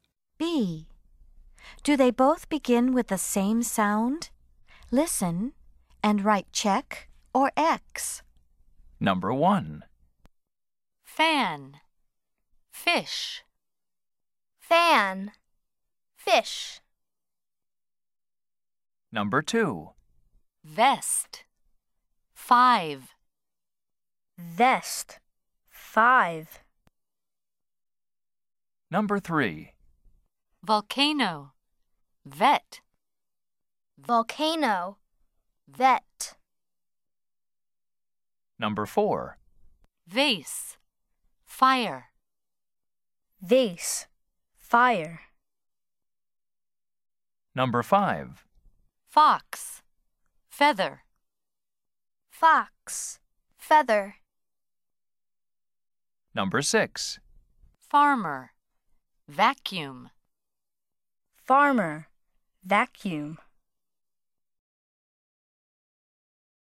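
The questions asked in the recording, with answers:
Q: Do they both begin with the same sound?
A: Yes (check): fan, fish

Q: Do they both begin with the same sound?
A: No (X): vest, five

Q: Do they both begin with the same sound?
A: Yes (check): volcano, vet

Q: Do they both begin with the same sound?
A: No (X): vase, fire

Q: Do they both begin with the same sound?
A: Yes (check): fox, feather

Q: Do they both begin with the same sound?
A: No (X): farmer, vacuum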